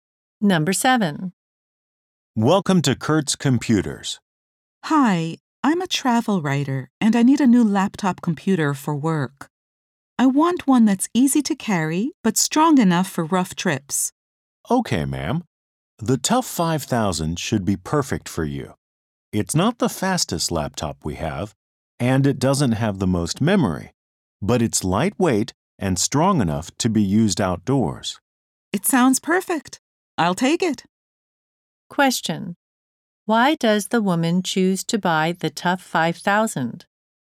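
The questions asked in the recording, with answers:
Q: Why does the woman choose to buy the Tough 5000?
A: It is lightweight and strong enough for rough trips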